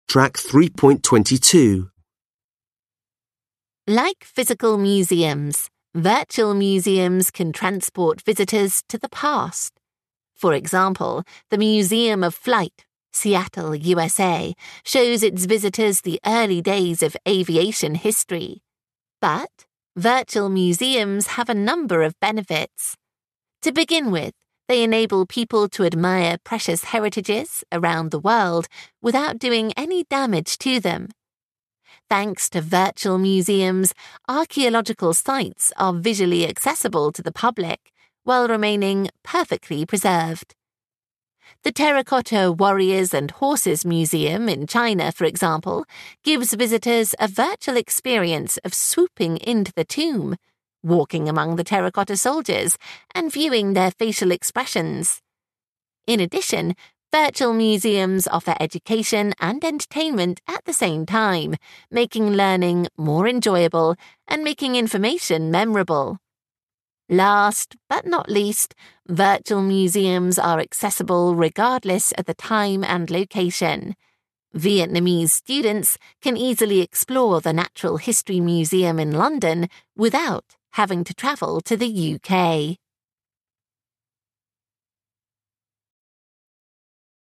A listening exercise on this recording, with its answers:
Listen again. Are the sentences true or false? Write T or F.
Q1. The Museum of Flight presents the predictions about future aviation.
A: F

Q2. Virtual museums help preserve world heritages.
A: T

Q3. The Terracotta Warrriors and Horses Museum in China allows visitors to actually walk among the soldiers.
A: F

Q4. A visit to a virtual museum is only a form of entertainment.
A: F

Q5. Visitors can get to any virtual museums easily whenever they want to.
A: T

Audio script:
Like physical museums that museums can transport visitors to the past. For example, the museum of flight, Seattle USA, shows its visitors the early days of aviation history. But virtual museums have a number of benefits. To begin with they enable people to admire precious heritages around the world without doing any damage to them. Thanks to virtual museums, archaeological sites are visually accessible to the public while remaining perfectly preserved. The terracotta warriors and horses museum in China for example gives visitors a virtual experience of sweeping into the tomb, walking among the terracotta soldiers and feeling that facial expressions. In addition to museums of the education and entertainment at the same time making learning more enjoyable and making information memorable. Last but not least, virtual museums are accessible regardless at the time and location. Vietnamese students can easily explore the natural history museum in London without having to travel to the UK.

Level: Lớp 10